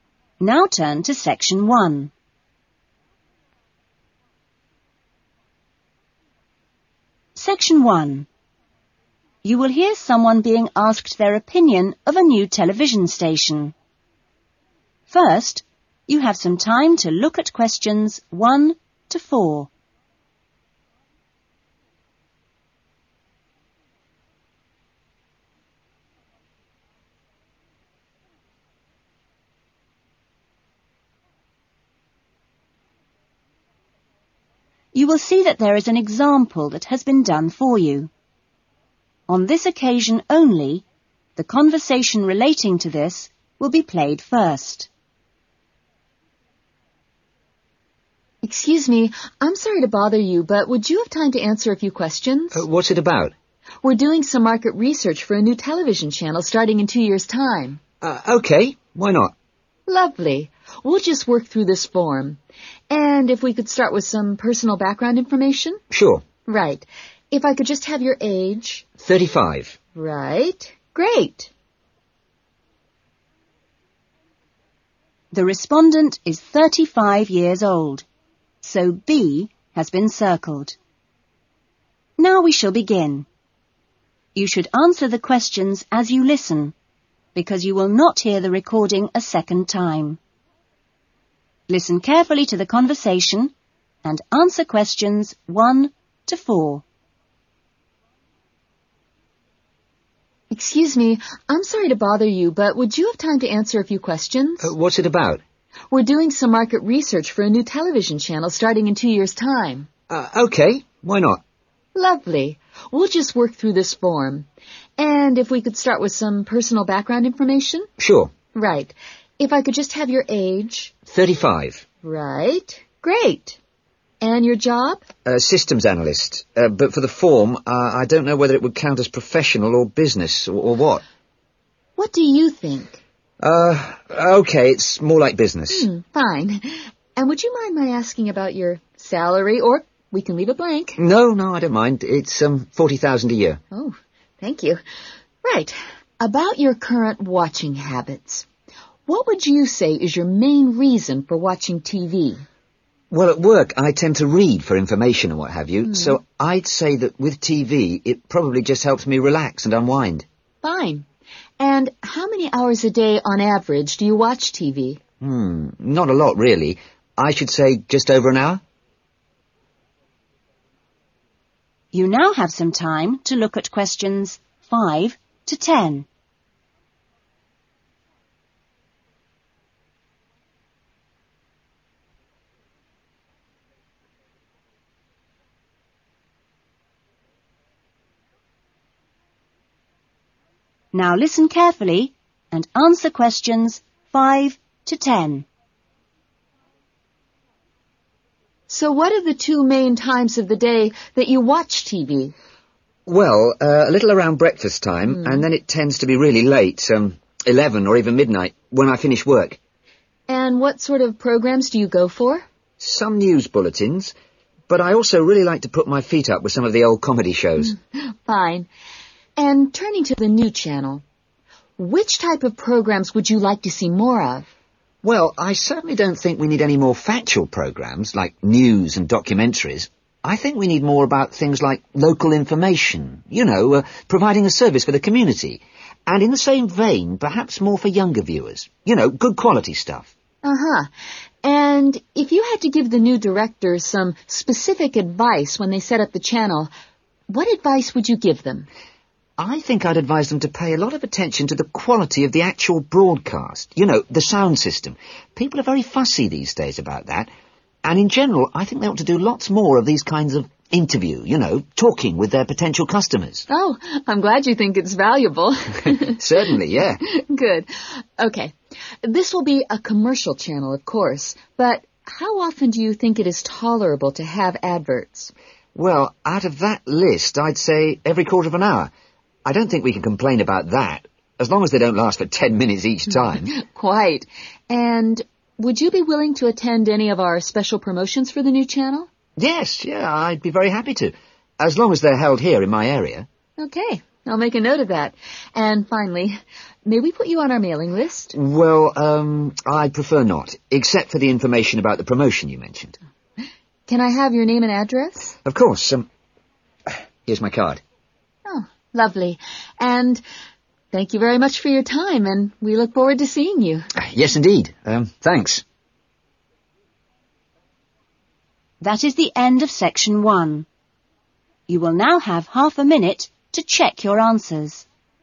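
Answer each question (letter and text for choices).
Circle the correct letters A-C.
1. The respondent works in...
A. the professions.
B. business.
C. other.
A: B. business.

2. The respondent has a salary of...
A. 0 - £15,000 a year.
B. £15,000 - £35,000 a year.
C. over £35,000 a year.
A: C. over £35,000 a year.

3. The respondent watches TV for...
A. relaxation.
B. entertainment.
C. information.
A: A. relaxation.

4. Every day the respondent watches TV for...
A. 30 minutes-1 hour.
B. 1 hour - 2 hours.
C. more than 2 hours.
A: B. 1 hour - 2 hours.

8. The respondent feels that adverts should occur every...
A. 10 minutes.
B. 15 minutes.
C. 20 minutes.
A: B. 15 minutes.

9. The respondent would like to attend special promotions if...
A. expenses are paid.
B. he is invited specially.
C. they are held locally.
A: C. they are held locally.

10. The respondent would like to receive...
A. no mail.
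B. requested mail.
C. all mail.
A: B. requested mail.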